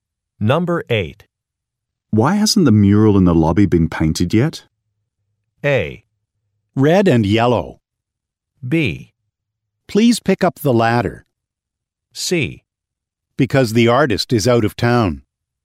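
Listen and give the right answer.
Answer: C: Because the artist is out of town.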